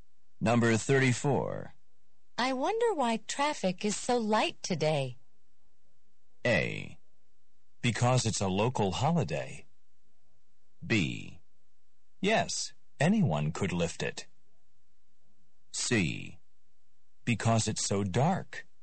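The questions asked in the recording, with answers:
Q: I wonder why traffic is so light today.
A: A: Because it's a local holiday.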